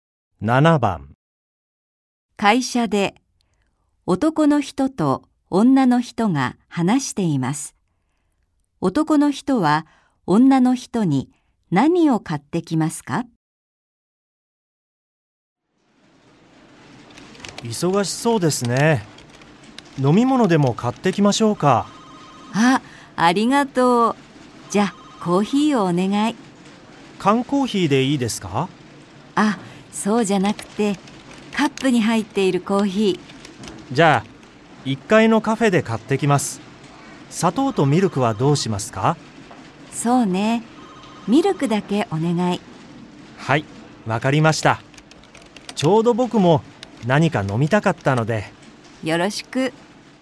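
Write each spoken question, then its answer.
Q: 男の人は女の人に何を買ってきますか?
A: カップのコーヒー(ミルクだけ)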